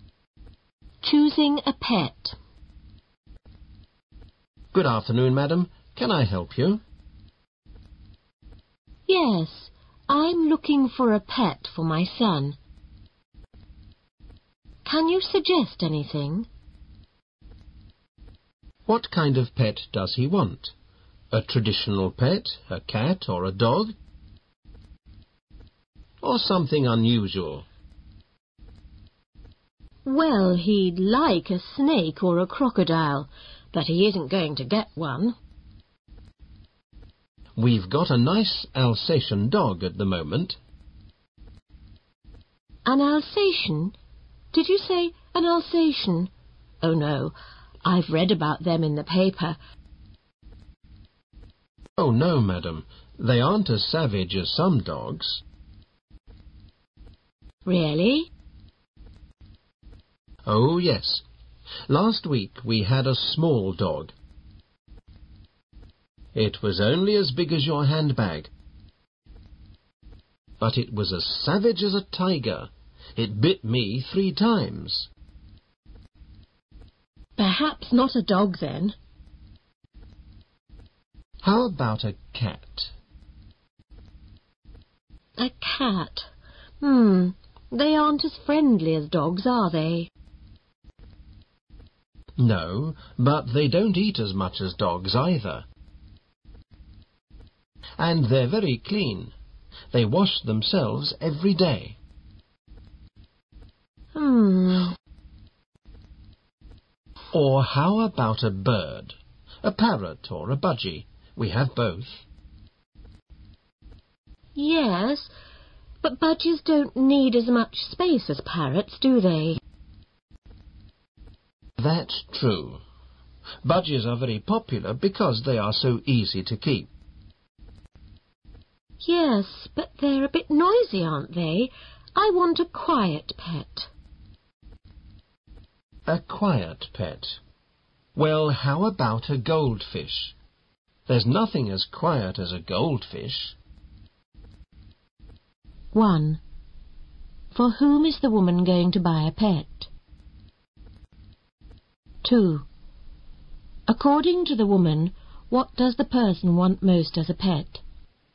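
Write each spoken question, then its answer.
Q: For whom is the woman going to buy a pet?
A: For her son

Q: According to the woman, what does the person want most as a pet?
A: A snake or a crocodile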